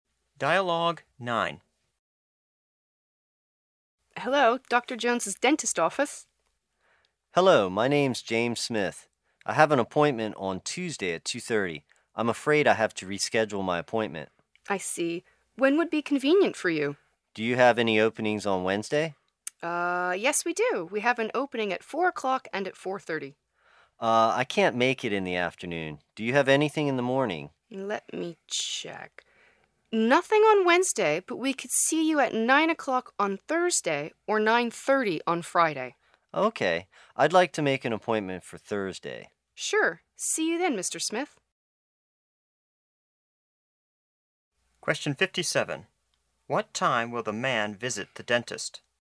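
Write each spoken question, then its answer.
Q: What time will the man visit the dentist?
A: 9 o'clock on Thursday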